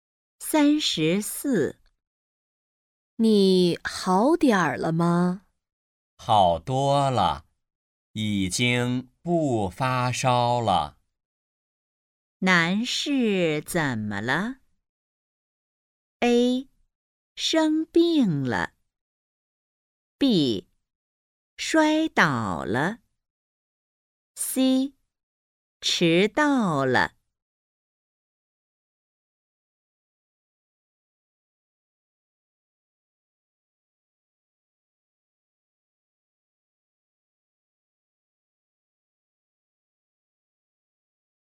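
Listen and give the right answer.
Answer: A: 生病了。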